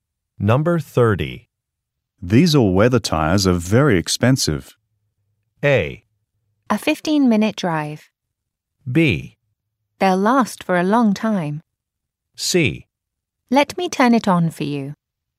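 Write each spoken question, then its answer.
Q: These all-weather tires are very expensive.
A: B: They'll last for a long time.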